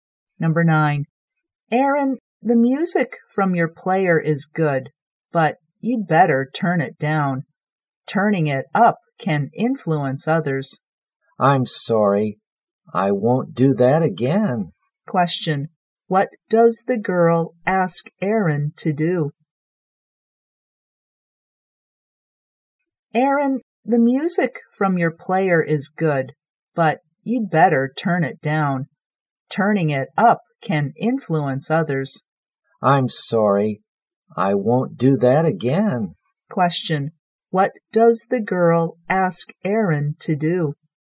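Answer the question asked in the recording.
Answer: Turn the music down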